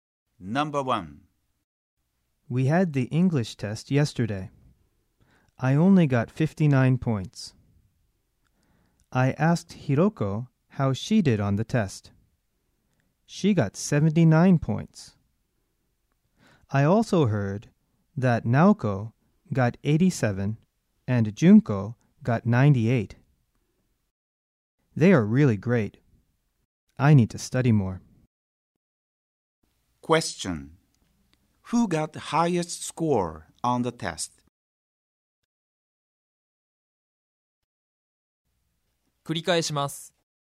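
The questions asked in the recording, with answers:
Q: Question. Who got the highest score on the test?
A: Junko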